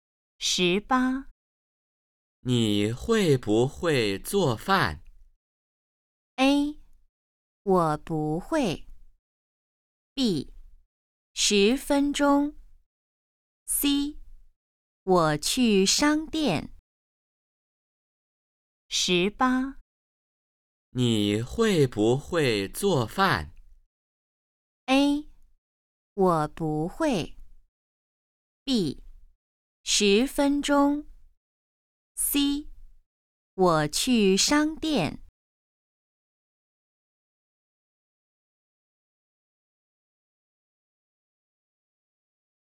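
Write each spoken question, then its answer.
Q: 你会不会做饭?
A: A: 我不会。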